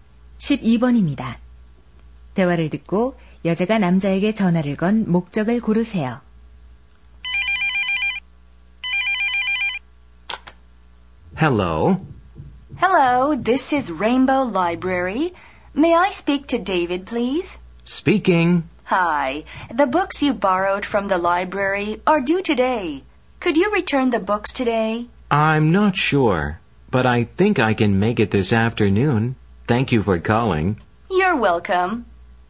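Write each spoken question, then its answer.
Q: 대화를 듣고 여자가 남자에게 전화를 건 목적을 고르세요.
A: 빌린 책 반납 요청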